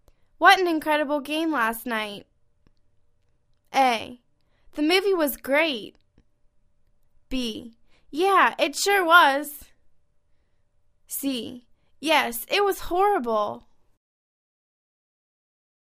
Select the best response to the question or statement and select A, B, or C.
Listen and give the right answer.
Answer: Yeah, it sure was!